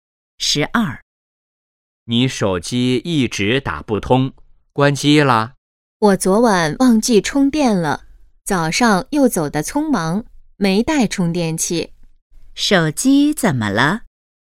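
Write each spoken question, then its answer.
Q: 手机怎么了?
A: 没电了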